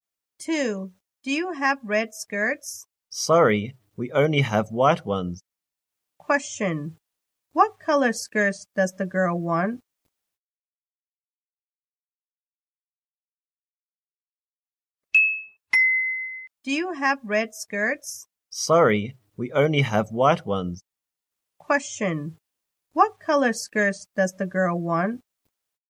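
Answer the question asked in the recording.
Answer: Red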